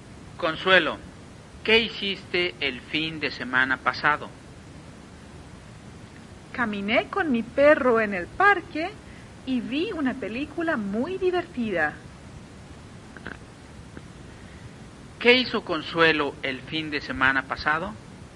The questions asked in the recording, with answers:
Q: ¿Qué hizo Consuelo el fin de semana pasado?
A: Consuelo caminó con su perro en el parque y vio una película muy divertida.